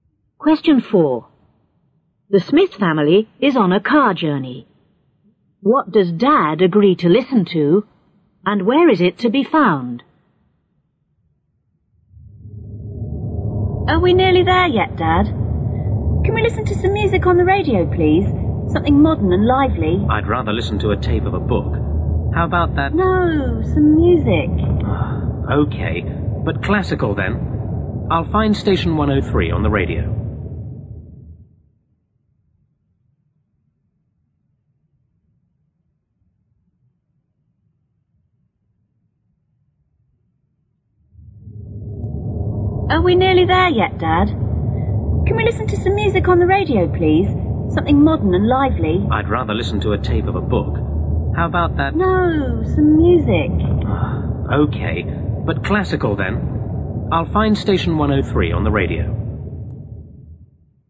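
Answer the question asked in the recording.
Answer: Classical music on radio station 103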